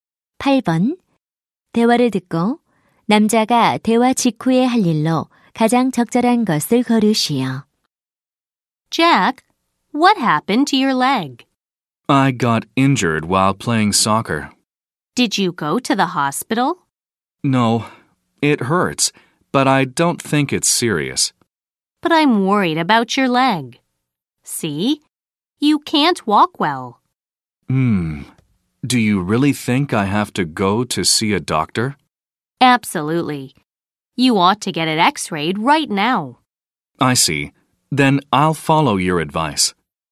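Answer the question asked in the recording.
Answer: 병원에 가서 엑스레이 찍기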